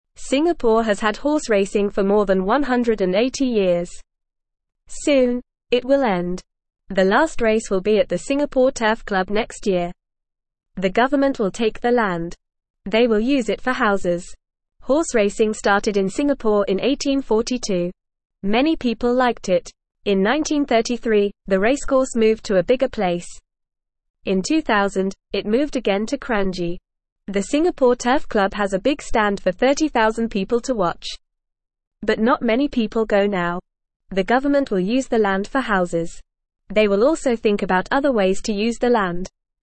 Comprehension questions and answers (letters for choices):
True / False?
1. Singapore has had horse racing for more than 300 years.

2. Horse racing started in Singapore in 1942.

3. The last race will be at the Singapore Turf Club next year.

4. The government will use the land for houses.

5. The racecourse moved to a bigger place in 1933.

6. The Singapore Turf Club has a big stand for 10,000 people to watch.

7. Not many people go to watch horse racing now.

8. The government will only use the land for houses.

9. They will use it for (1)______.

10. Horse racing started in Singapore in (2)______.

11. In 2000, it moved again to (3)______.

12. How long has Singapore had horse racing?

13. When will the last race be?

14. Where will the last race happen?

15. In what year did the racecourse move to Kranji?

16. How many people can watch at the Singapore Turf Club?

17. What else will the government think about for the land?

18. What has Singapore had for more than 180 years?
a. car racing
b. horse racing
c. soccer games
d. dog racing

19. When will the last horse race be at the Singapore Turf Club?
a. this year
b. in 5 years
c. in 10 years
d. next year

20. In what year did the racecourse move to a bigger place?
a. 2000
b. 1933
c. 1842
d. 1800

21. How many people can watch the race at the Singapore Turf Club?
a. 10,000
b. 20,000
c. 30,000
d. 40,000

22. Where did the racecourse move to in 2000?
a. Kranji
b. Singapore Turf Club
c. a bigger place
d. a smaller place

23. What will the government think about for the land?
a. other ways to use it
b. making it a park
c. building a school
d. building a shopping mall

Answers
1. False
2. False
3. True
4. True
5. True
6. False
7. True
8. False
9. houses
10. 1842
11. Kranji
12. Singapore has had horse racing for more than 180 years.
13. The last race will be next year.
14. The last race will happen at the Singapore Turf Club.
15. The racecourse moved to Kranji in 2000.
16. 30,000 people can watch at the Singapore Turf Club.
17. The government will also think about other ways to use the land.
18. b
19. d
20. b
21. c
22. a
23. a

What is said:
Singapore has had horse racing for more than 180 years. Soon, it will end. The government will take the land. They will use it for houses.
Horse racing started in Singapore in 1842. Many people liked it. In 1933, the racecourse moved to a bigger place. In 2000, it moved again to Kranji. The Singapore Turf Club has a big stand for 30,000 people to watch. But not many people go now.
They will also think about other ways to use the land.

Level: Level 1